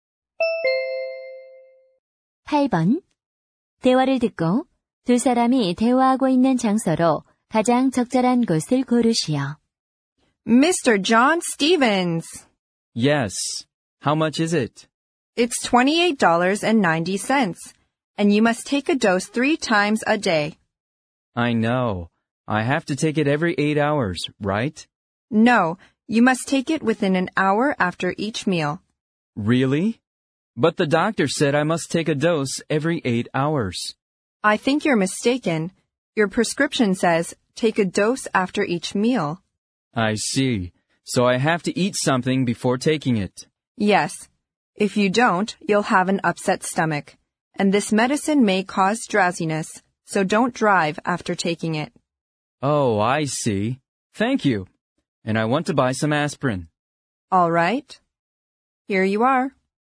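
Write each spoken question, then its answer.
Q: 대화를 듣고 두 사람이 대화하고 있는 장소로 가장 적절한 곳을 고르시오.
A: 약국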